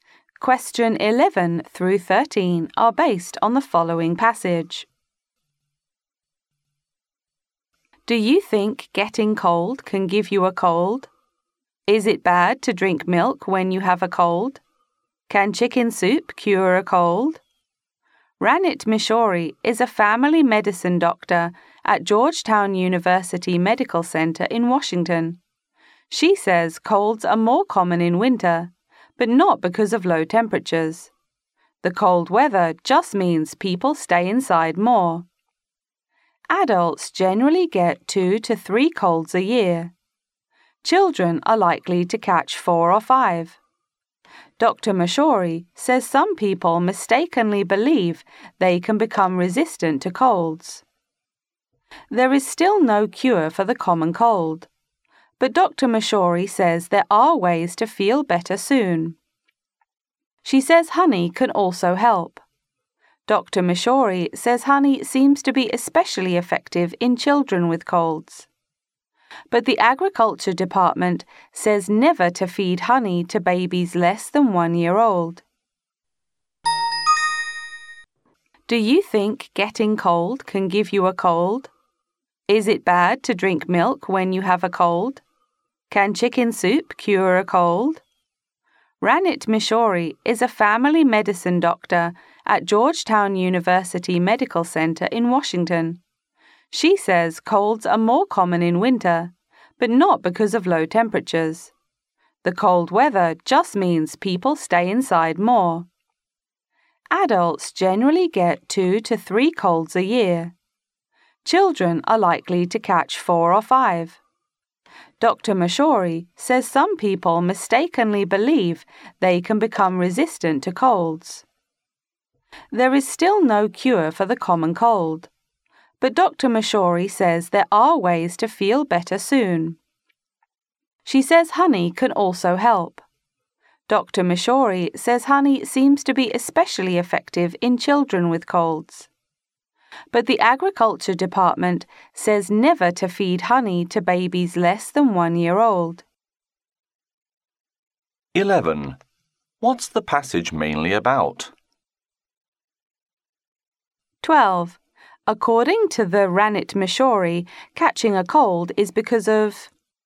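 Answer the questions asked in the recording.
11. The common cold
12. People staying inside more in cold weather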